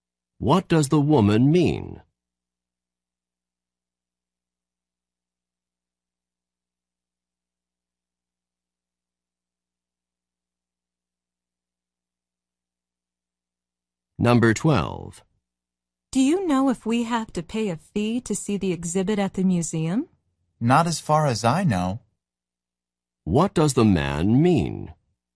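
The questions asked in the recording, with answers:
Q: What does the man mean?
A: He doesn't think there is a fee for the exhibit.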